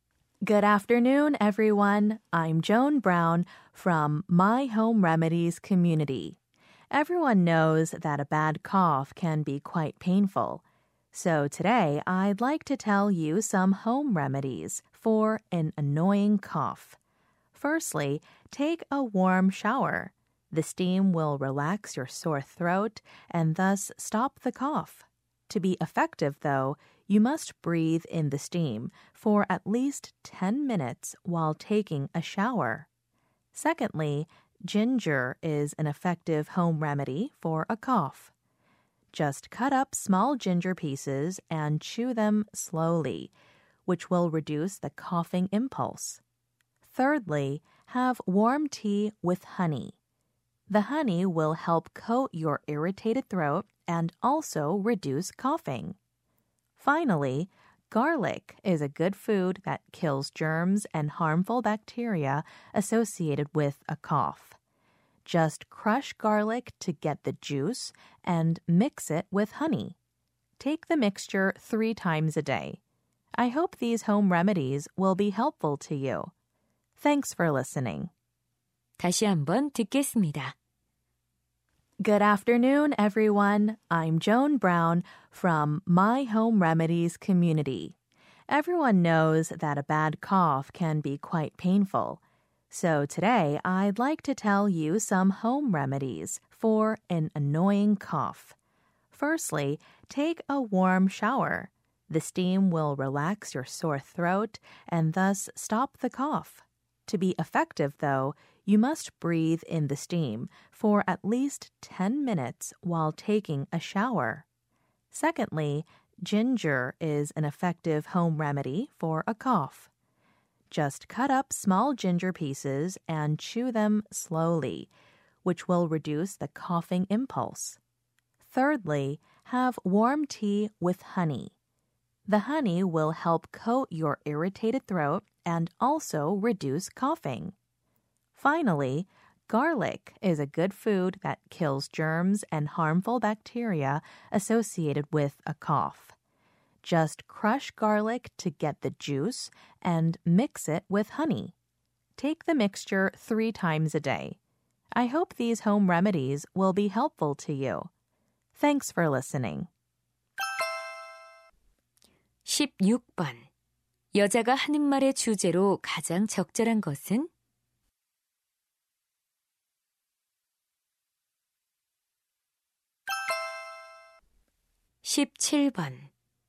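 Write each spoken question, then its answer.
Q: 여자가 하는 말의 주제로 가장 적절한 것은?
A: 기침을 멎게 하는 민간요법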